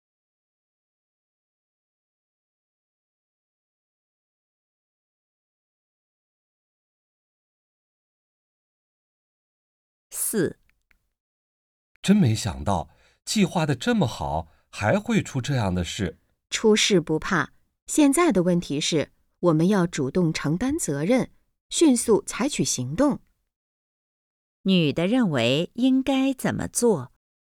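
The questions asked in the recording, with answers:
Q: 女的认为应该怎么做?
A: 主动承担责任,迅速采取行动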